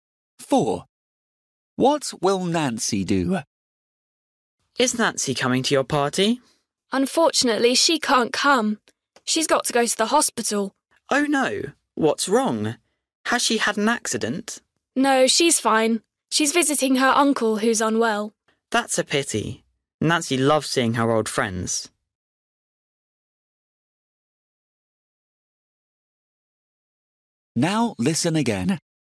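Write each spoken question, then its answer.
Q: What will Nancy do?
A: visit her uncle in hospital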